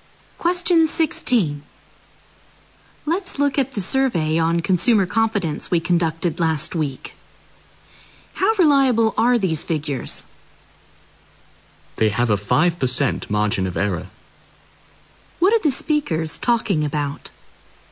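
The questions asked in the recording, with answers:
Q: What are the speakers talking about?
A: How reliable the figures from their consumer confidence survey are.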